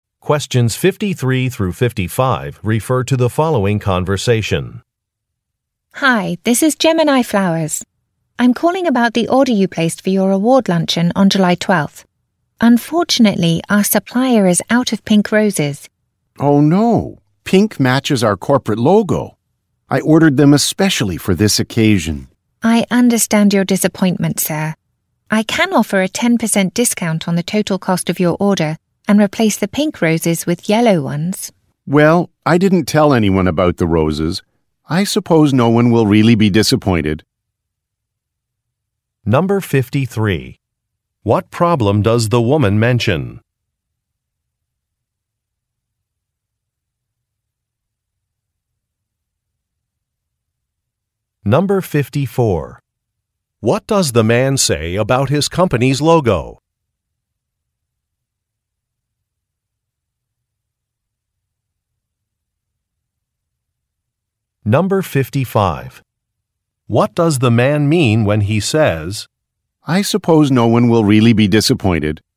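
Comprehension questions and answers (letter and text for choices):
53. What problem does the woman mention?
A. There is no time to create centerpieces.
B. The shop never received the man's order.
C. A supplier cannot fulfill an order.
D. The wrong date is on the order form.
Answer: C. A supplier cannot fulfill an order.

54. What does the man say about his company's logo?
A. It was designed many years ago.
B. It contains the color pink.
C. It won an award.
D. It features a drawing of flowers.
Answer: B. It contains the color pink.

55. What does the man mean when he says, "I suppose no one will really be disappointed"?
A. He will postpone the luncheon.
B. He will accept the woman's offer.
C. He will find a replacement award.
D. He will modify the company's logo.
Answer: B. He will accept the woman's offer.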